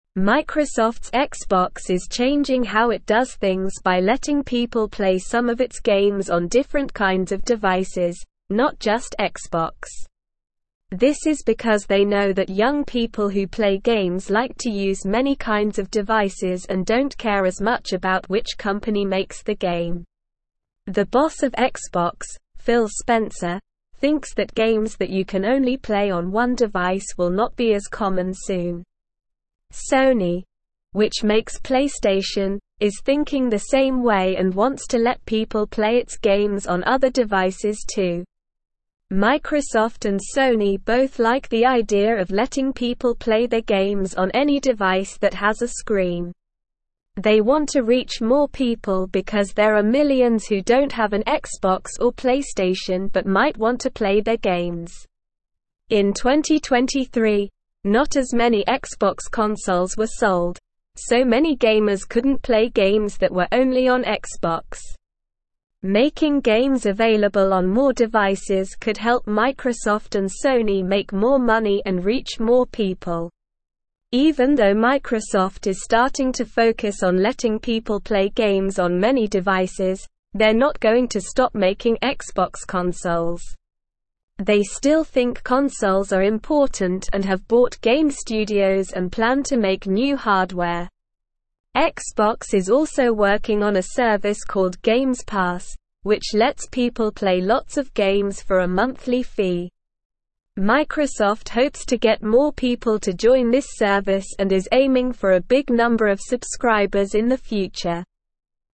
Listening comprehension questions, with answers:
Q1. Microsoft's Xbox is changing how it does things by letting people (1)______ some of its games on different kinds of (2)______, not just Xbox.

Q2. Microsoft's Xbox is changing how it does things by letting people (1)______ some of its games on different kinds of (2)______, not just Xbox.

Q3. This is because they know that young people who play games like to use many kinds of devices and don't (3)______ as much about which company makes the game.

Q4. Sony, which (4)______ PlayStation, is thinking the (5)______ way and wants to let people play its games on other devices too.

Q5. Sony, which (4)______ PlayStation, is thinking the (5)______ way and wants to let people play its games on other devices too.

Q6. They want to (6)______ more people because there are millions who don't have an Xbox or PlayStation but might want to play their (7)______.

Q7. They want to (6)______ more people because there are millions who don't have an Xbox or PlayStation but might want to play their (7)______.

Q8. Making games available on more devices could (8)______ Microsoft and Sony make more money and reach more (9)______.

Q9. Making games available on more devices could (8)______ Microsoft and Sony make more money and reach more (9)______.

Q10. Even though Microsoft is starting to focus on letting people play games on many devices, they're not going to (10)______ making Xbox consoles.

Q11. Xbox is also working on a service (11)______ Games Pass, which lets people play lots of games for a monthly fee.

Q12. (12)______ hopes to get more people to join this service and is aiming for a big number of subscribers in the future.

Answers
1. play
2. devices
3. care
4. makes
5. same
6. reach
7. games
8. help
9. people
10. stop
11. called
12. Microsoft

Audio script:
Microsoft's Xbox is changing how it does things by letting people play some of its games on different kinds of devices, not just Xbox. This is because they know that young people who play games like to use many kinds of devices and don't care as much about which company makes the game. The boss of Xbox, Phil Spencer, thinks that games that you can only play on one device will not be as common soon. Sony, which makes PlayStation, is thinking the same way and wants to let people play its games on other devices too.
Microsoft and Sony both like the idea of letting people play their games on any device that has a screen. They want to reach more people because there are millions who don't have an Xbox or PlayStation but might want to play their games. In 2023, not as many Xbox consoles were sold, so many gamers couldn't play games that were only on Xbox. Making games available on more devices could help Microsoft and Sony make more money and reach more people.
Even though Microsoft is starting to focus on letting people play games on many devices, they're not going to stop making Xbox consoles. They still think consoles are important and have bought game studios and plan to make new hardware. Xbox is also working on a service called Games Pass, which lets people play lots of games for a monthly fee. Microsoft hopes to get more people to join this service and is aiming for a big number of subscribers in the future.

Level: Level 2